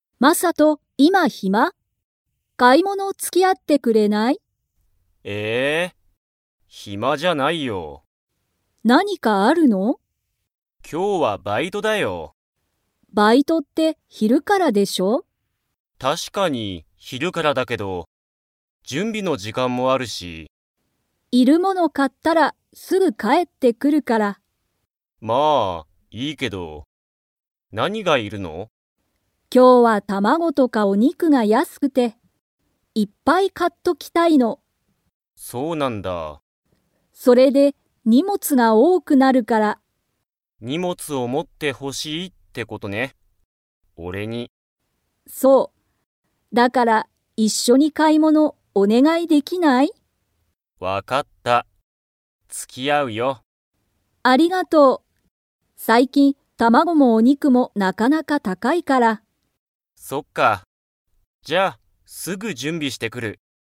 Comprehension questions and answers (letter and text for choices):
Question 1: マサトは、今日きょうは何なにがありますか?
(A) 旅行りょこう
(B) バイト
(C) テスト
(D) 引ひっ越こし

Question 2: マサトは、お母かあさんの買かい物ものに 。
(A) 付つき合あう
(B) 付つき合あわない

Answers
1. (B) バイト
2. (A) 付つき合あう

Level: Level 4